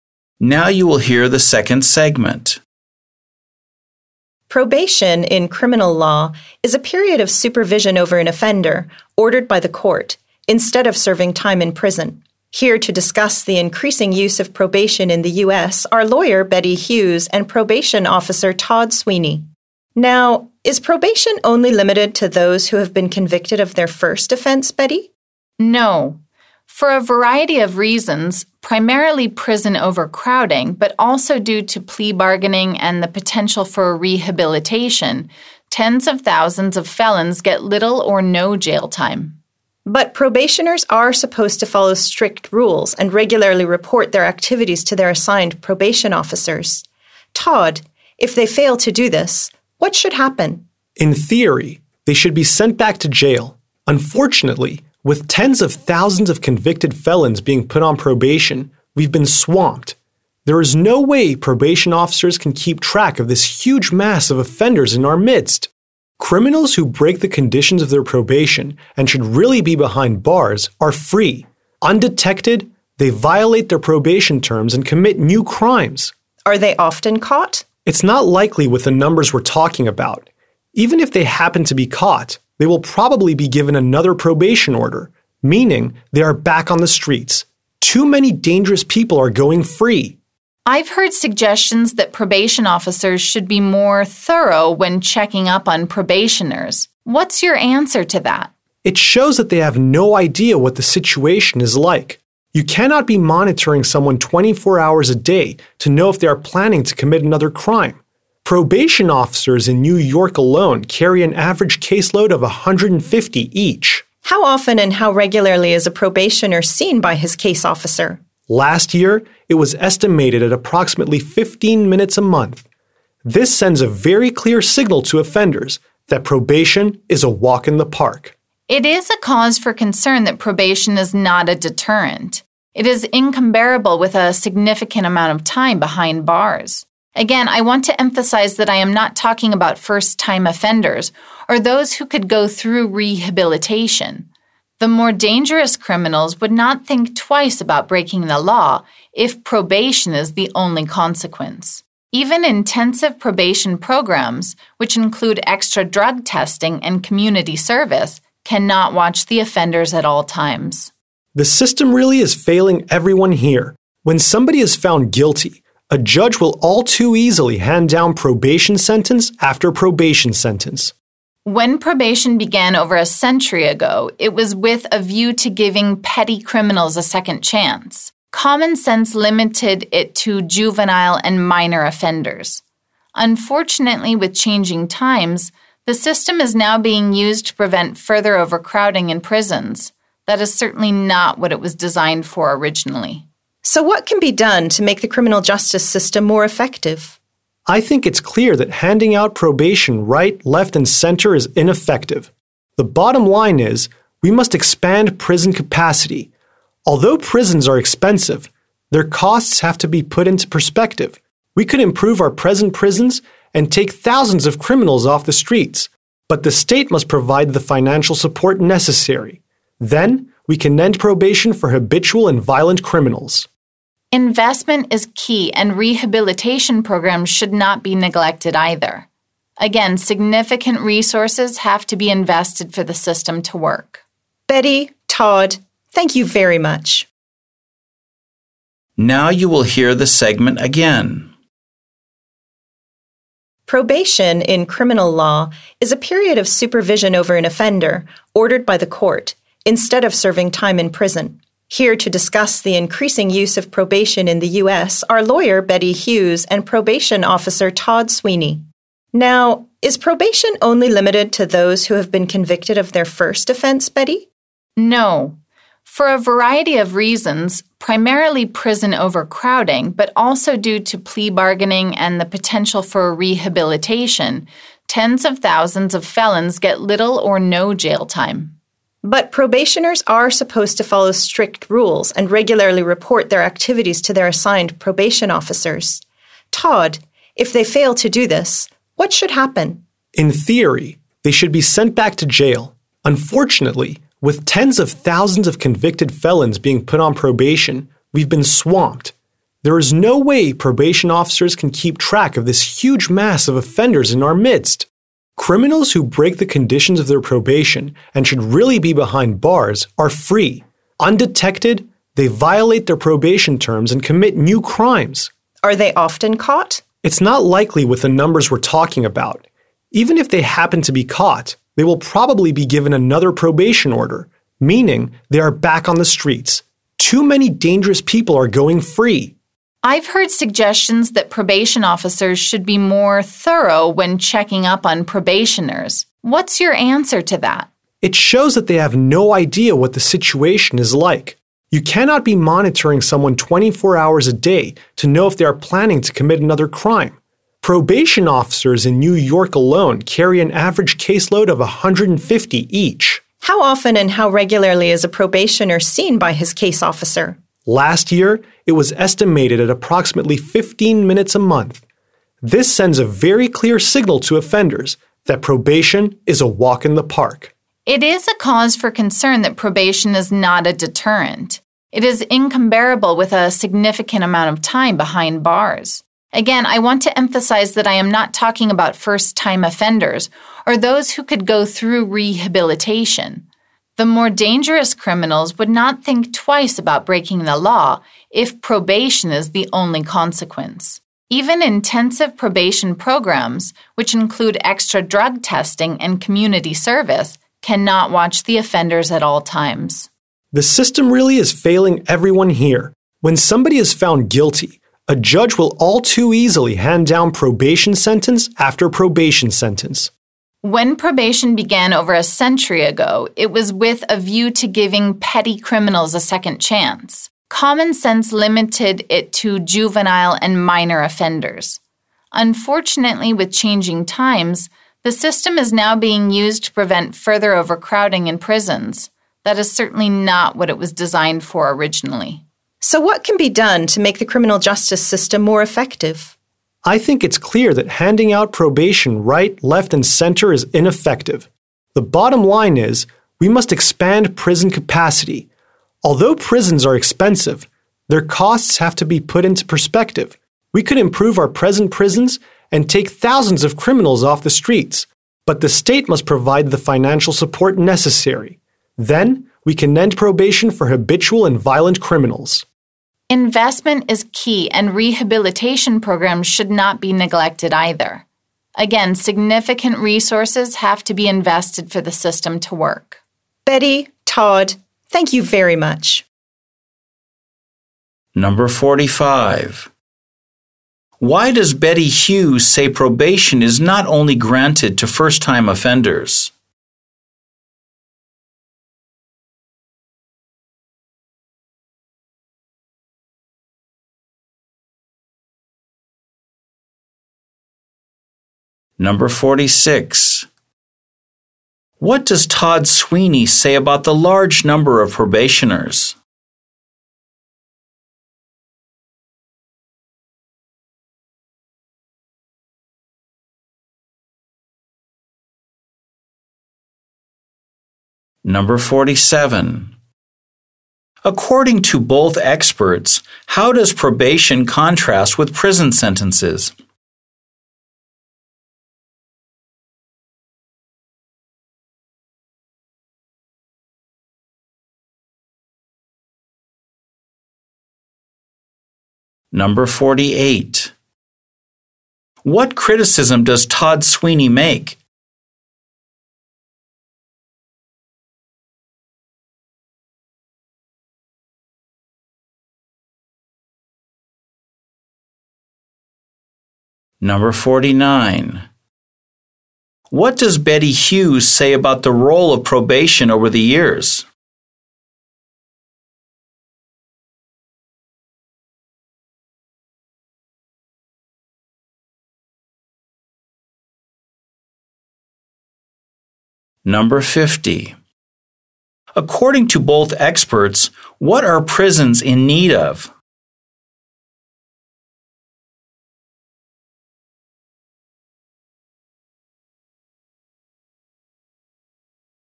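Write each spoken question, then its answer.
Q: Why does Betty Hughes say probation is not only granted to first-time offenders?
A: Mainly because prisons are overcrowded, and also because of plea bargaining and the chance of rehabilitation

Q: What does Todd Sweeney say about the large number of probationers?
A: Probation officers are swamped and cannot keep track of them

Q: What does Betty Hughes say about the role of probation over the years?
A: It was meant to give petty and juvenile offenders a second chance, but now it is used to stop prisons from getting more overcrowded

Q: According to both experts, what are prisons in need of?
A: More money from the state, to add space and improve them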